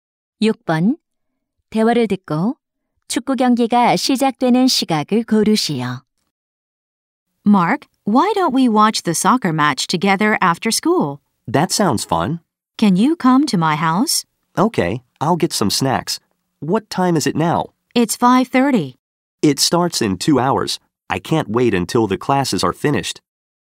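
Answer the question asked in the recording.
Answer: 7시 30분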